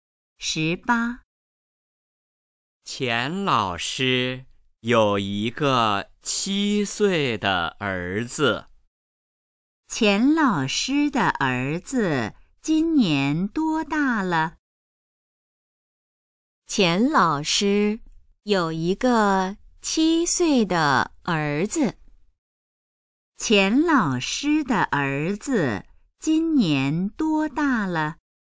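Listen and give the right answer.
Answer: 七岁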